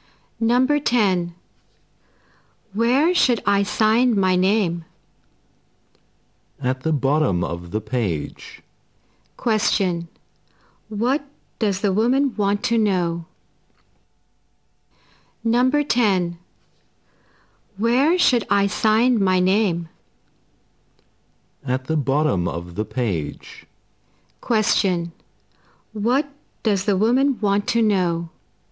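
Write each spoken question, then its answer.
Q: What does the woman want to know?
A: Where to sign her name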